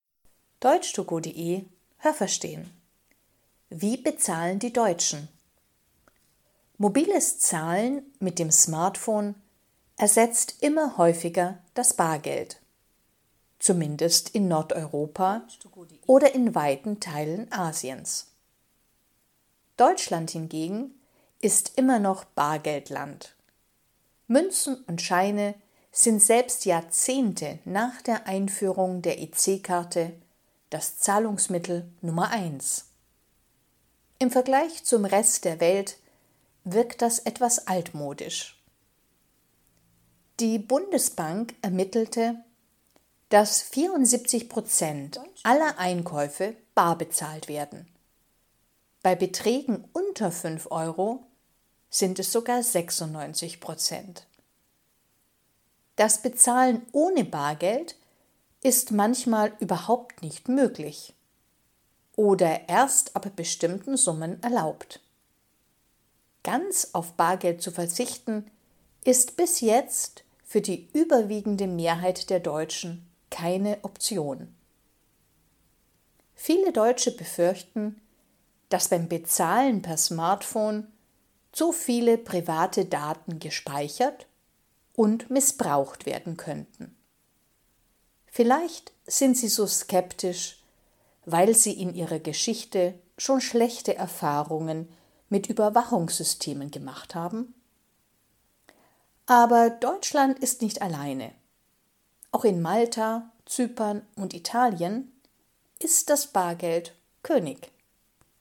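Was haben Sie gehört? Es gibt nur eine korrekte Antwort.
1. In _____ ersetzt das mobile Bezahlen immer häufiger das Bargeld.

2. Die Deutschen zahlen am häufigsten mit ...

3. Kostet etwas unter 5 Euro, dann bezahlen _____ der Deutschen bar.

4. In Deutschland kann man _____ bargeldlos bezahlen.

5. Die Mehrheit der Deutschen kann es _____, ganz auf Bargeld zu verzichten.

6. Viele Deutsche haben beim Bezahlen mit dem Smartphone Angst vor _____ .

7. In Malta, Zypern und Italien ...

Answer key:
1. Nordeuropa oder in weiten Teilen Asiens
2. Bargeld (Münzen und Scheinen)
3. 96%
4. manchmal nicht oder erst ab bestimmten Summen
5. sich nicht vorstellen
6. Speicherung und Missbrauch privater Daten
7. ist das Bargeld König.

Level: Hörtexte B (mittel)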